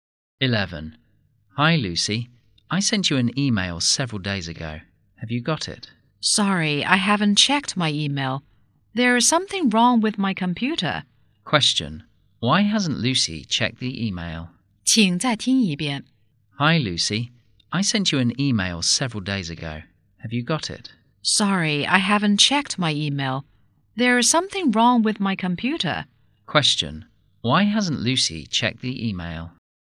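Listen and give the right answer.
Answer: Something is wrong with her computer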